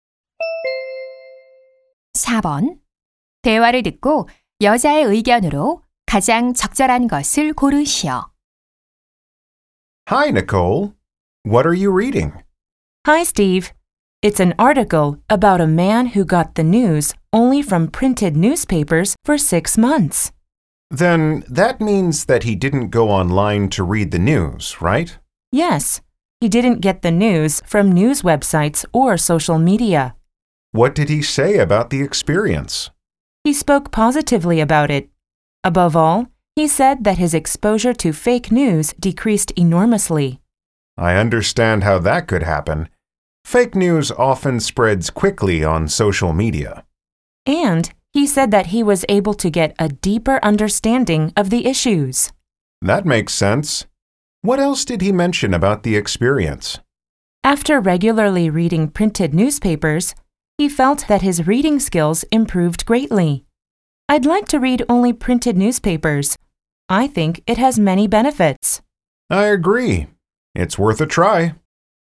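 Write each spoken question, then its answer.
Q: 대화를 듣고 여자의 의견으로 가장 적절한 것을 고르시오.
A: 종이 신문만 읽는 것은 이점이 많다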